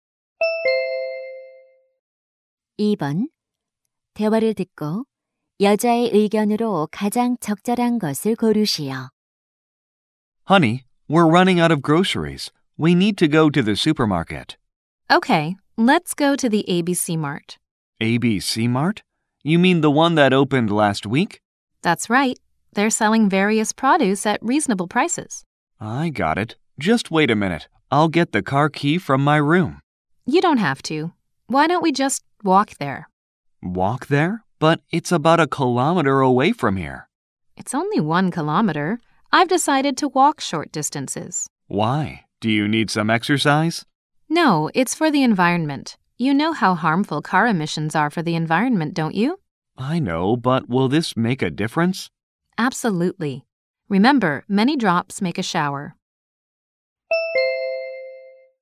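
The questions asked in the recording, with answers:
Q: 대화를 듣고 여자의 의견으로 가장 적절한 것을 고르시오.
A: 환경을 위해 가까운 거리는 걸어 다녀야 한다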